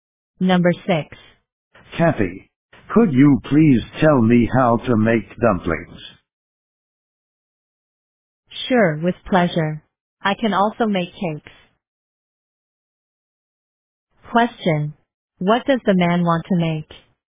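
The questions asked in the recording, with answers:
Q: Question, what does the man want to make?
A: Dumplings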